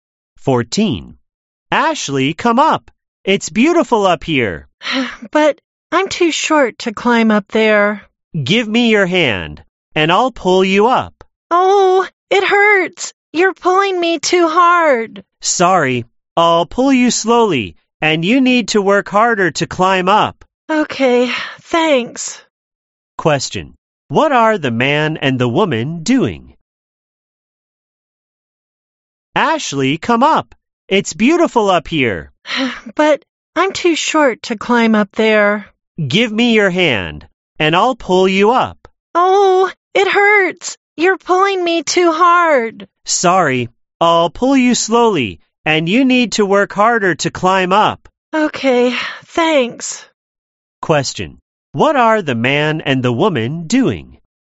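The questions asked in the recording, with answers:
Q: what are the man and the woman doing?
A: Climbing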